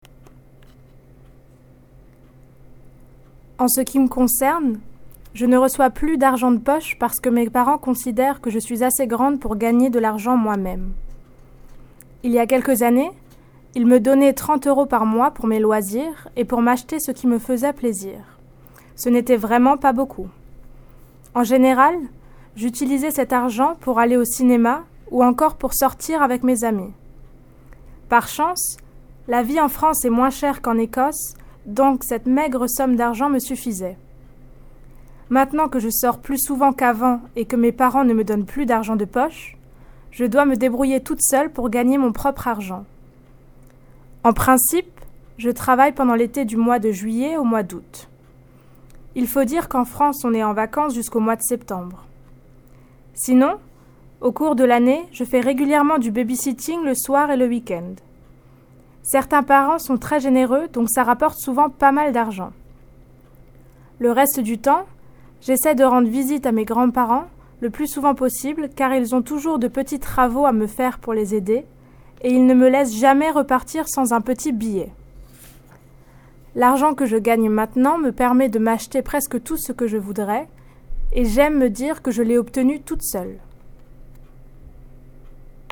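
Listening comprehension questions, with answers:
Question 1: Why does Sarah no longer receive pocket money? (2)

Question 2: How much did she used to receive from her parents and what does she say about this amount? (2)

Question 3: What did she normally spend her pocket money on? (2)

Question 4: What comparison does she make between Scotland and France? (2)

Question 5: Nowadays she must work to earn money. When does she normally work in summer? (2)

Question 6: What does do to earn money the rest of the year? (2)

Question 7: Why does she mention her grandparents? (2)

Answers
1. Her parents think she is old enough to earn money herself
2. 30 euros a month; it was really not much
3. Going to the cinema and going out with friends
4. Life in France is cheaper than in Scotland, so the small sum was enough
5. From July to August
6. Babysitting in the evenings and at weekends
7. She does little jobs for them and they always give her some money

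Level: New Higher French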